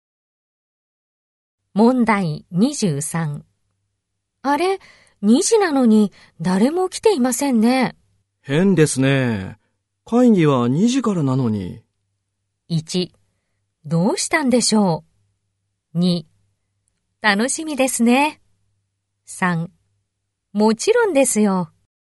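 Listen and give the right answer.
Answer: 1: どうしたんでしょう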